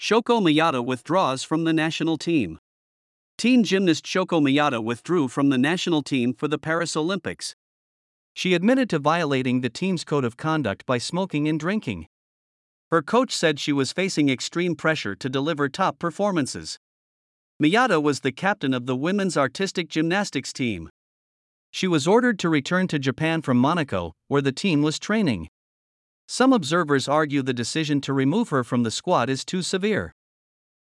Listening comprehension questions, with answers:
英語ニュースの音声を聞き、各空欄に入る英文を正確に書き取ってください。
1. Teen gymnast Shoko Miyata ( ).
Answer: withdrew from the national team for the Paris Olympics

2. She admitted to violating the team's ( ).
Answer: code of conduct by smoking and drinking

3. Her coach said she was ( ).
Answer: facing extreme pressure to deliver top performances

「誰が(Who)」「何をしたのか(What)」「なぜ(Why)」の答えを探しながら聞きましょう。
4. 誰が(Who)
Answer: Teen gymnast Shoko Miyata

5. 何をしたのか(What)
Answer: withdrew from the national team for the Paris Olympics

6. なぜ(Why)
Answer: for violating the team's code of conduct by smoking and drinking.

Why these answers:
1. ⇒ 「withdraw – withdrew – withdrawn(不規則変化)」はニュース英語によく出る動詞で、今回のTopicのキーワードです。
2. ⇒ あまり馴染みのない表現かもしれませんが、音を注意深く聞き取れば正確に書ける部分です。文脈から意味を類推する読解力も必要です。

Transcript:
Shoko Miyata Withdraws from the National Team
Teen gymnast Shoko Miyata withdrew from the national team for the Paris Olympics.
She admitted to violating the team's code of conduct by smoking and drinking.
Her coach said she was facing extreme pressure to deliver top performances.
Miyata was the captain of the women's artistic gymnastics team.
She was ordered to return to Japan from Monaco, where the team was training.
Some observers argue the decision to remove her from the squad is too severe.